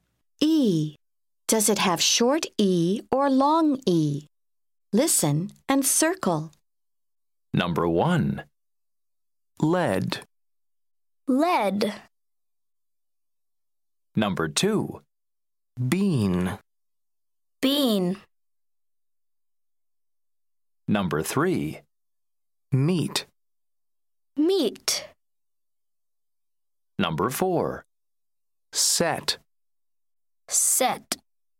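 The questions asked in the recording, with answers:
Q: Number 2. Bean.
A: long E

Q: Number 3. Meat.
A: long E

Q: Number 4. Set.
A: short E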